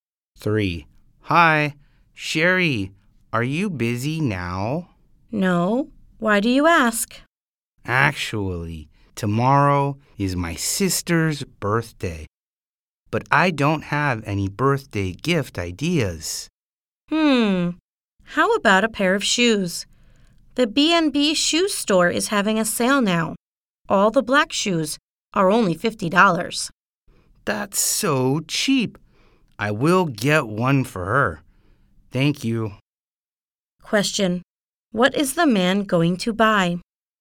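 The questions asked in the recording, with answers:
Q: Question. What is the man going to buy?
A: A pair of black shoes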